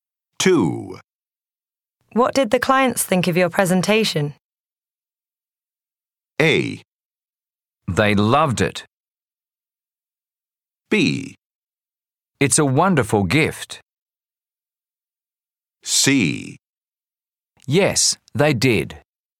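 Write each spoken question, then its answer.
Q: What did the clients think of your presentation?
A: A: They loved it.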